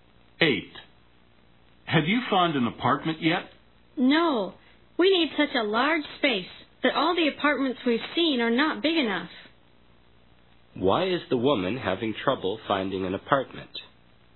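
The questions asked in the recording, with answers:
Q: Why is the woman having trouble finding an apartment?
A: The apartments they've seen are not big enough.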